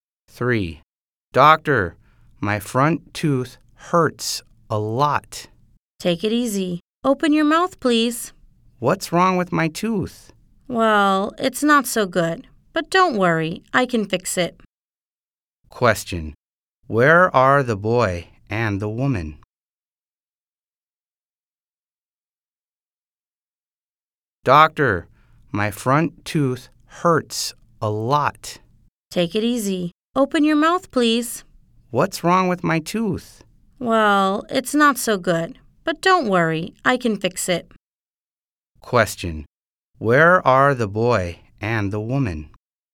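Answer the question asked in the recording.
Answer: At the dentist's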